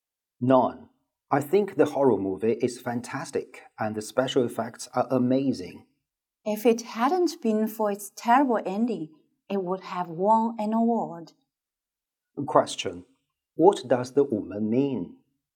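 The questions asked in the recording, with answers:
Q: What does the woman mean?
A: The movie is good, but its ending is terrible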